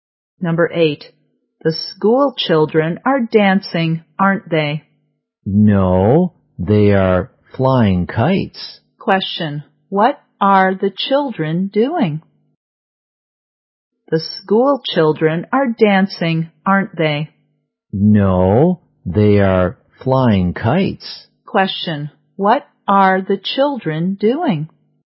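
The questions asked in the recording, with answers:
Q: what are the children doing?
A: Flying kites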